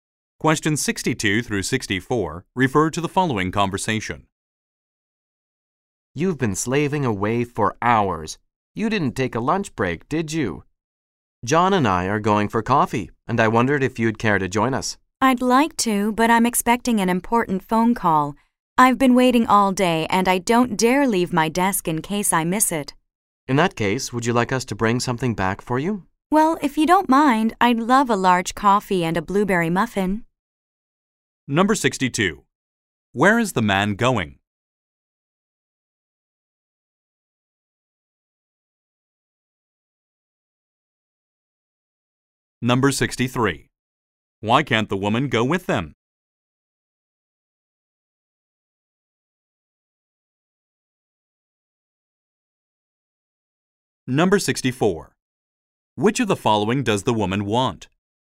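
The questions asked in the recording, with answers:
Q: Where is the man going?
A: For coffee

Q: Why can't the woman go with them?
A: She's expecting an important phone call

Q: Which of the following does the woman want?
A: A large coffee and a blueberry muffin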